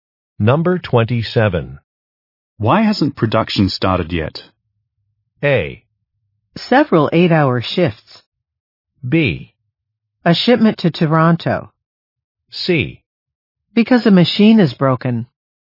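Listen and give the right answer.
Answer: C: Because a machine is broken.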